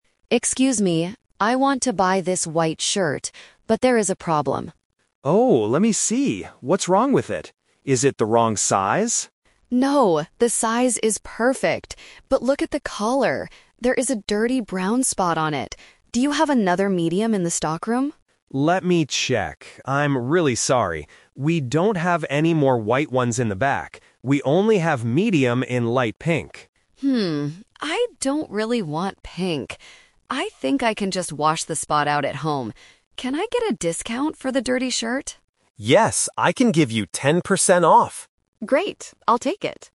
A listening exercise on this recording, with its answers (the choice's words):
Listen to the conversation between a customer and a shop assistant. Choose the correct answer (A, B, or C).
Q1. What is the problem with the white shirt?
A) It is the wrong size.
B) It is missing a button.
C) It has a dirty spot on it.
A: It has a dirty spot on it.

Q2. What color is the shirt that Peter finds in the stockroom?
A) White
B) Light pink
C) Brown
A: Light pink

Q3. What does Lily decide to do at the end?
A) Buy the pink shirt instead.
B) Buy the dirty white shirt with a discount.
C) Wait for new white shirts to arrive.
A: Buy the dirty white shirt with a discount.

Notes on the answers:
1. Lily shows Peter the shirt and says, "There is a dirty brown spot on it." Option (A) is the trap; Peter asks if it is the wrong size, but Lily says the size is perfect. Option (B) is a plausible problem for clothes but is not mentioned in the audio.
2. Peter checks the stockroom and says, "We only have medium in light pink." Option (A) is the trap; Lily wants a white shirt, but Peter says they don't have any more. Option (C) is also a trap; "brown" is the color of the dirty spot, not the color of the shirt in the stockroom.
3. This is "The Twist" of the situation. Peter offers the pink shirt (Option A - the trap), but Lily rejects it. Instead, she decides to take the white one because she can wash it, and asks, "Can I get a discount...?" Peter agrees to give her 10% off. Option (C) is not mentioned.

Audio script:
Lily: Excuse me, I want to buy this white shirt, but there is a problem.
Peter: Oh, let me see. What's wrong with it? Is it the wrong size?
Lily: No, the size is perfect. But look at the collar. There is a dirty brown spot on it. Do you have another medium in the stockroom?
Peter: Let me check... I'm really sorry. We don't have any more white ones in the back. We only have medium in light pink.
Lily: Hmm, I don't really want pink. I think I can just wash the spot out at home. Can I get a discount for the dirty shirt?